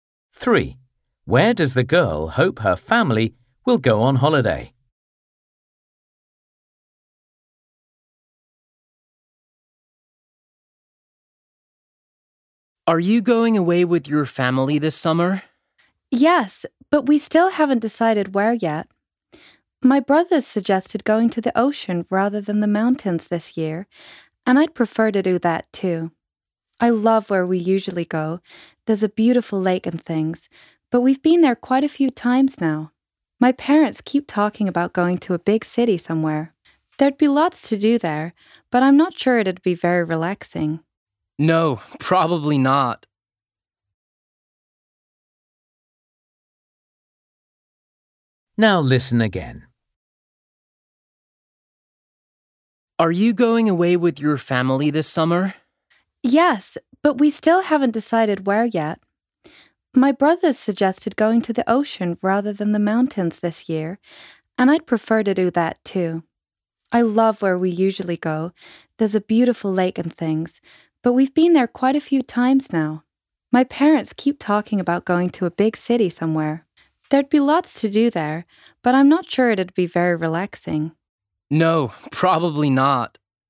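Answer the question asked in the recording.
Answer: the ocean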